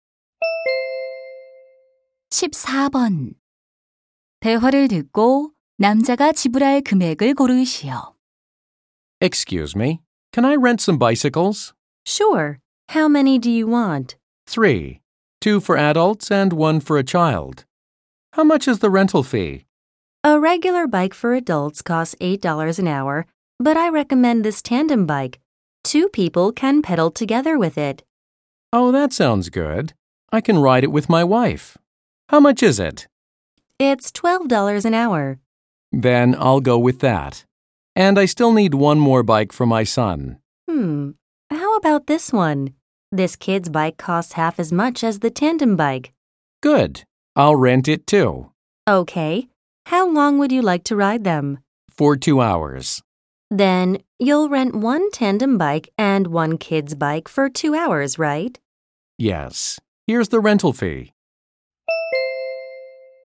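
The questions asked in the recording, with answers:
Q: 대화를 듣고 남자가 지불할 금액을 고르시오.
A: 36달러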